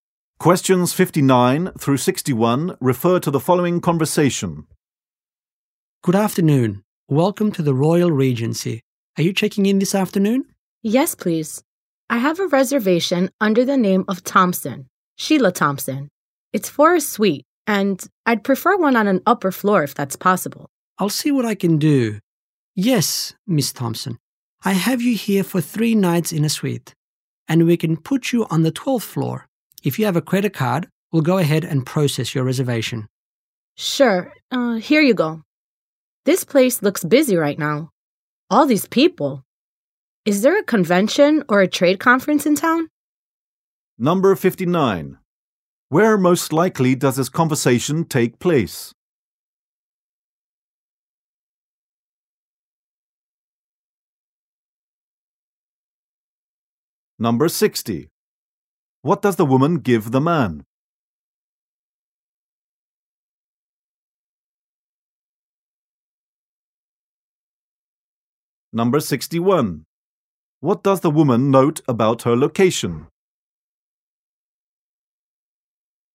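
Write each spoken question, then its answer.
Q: Where most likely does this conversation take place?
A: At a hotel

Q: What does the woman give the man?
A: A credit card

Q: What does the woman note about her location?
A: It is busy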